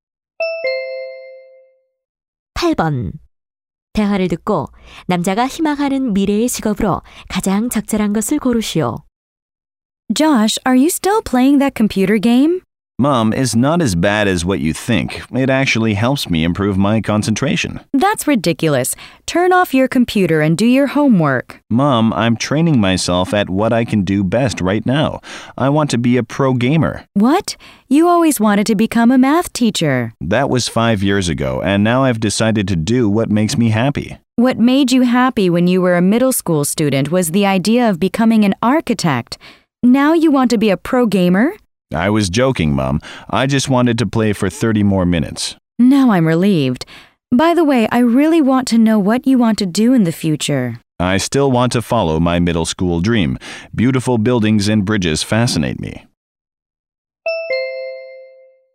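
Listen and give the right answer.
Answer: 건축가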